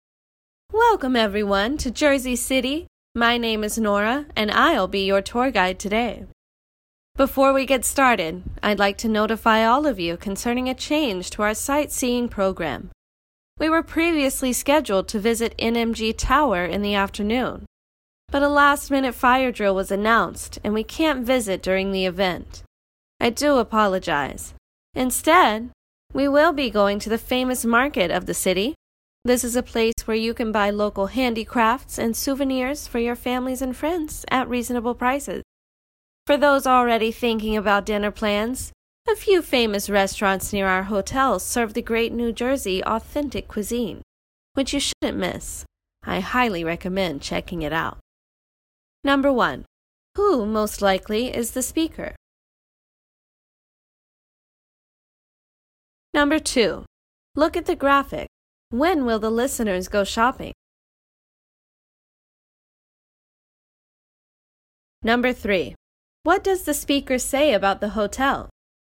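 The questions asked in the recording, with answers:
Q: Who most likely is the speaker?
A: A tour guide

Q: What does the speaker say about the hotel?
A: Famous restaurants near it serve authentic New Jersey cuisine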